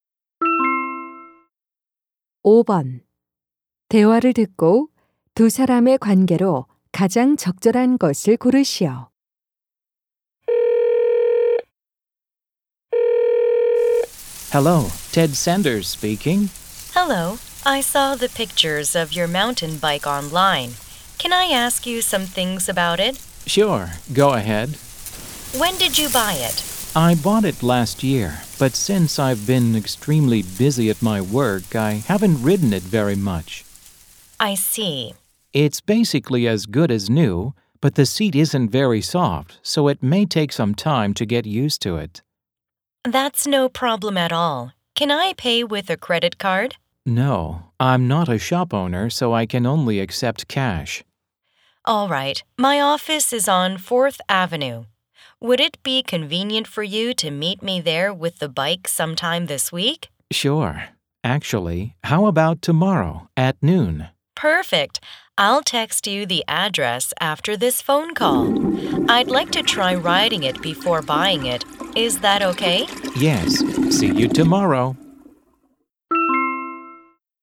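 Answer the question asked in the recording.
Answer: 중고 자전거 판매자와 구매자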